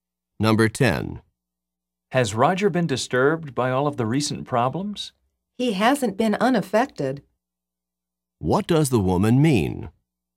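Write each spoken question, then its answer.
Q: What does the woman mean?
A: Roger has been affected by the problems.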